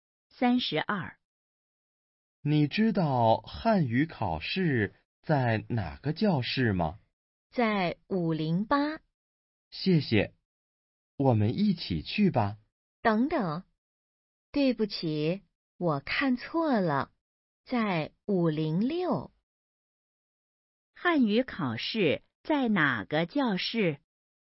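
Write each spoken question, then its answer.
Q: 汉语考试在哪个教室?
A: 506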